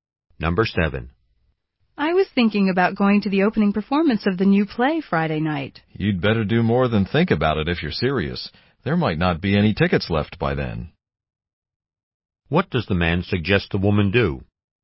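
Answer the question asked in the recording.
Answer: Buy tickets soon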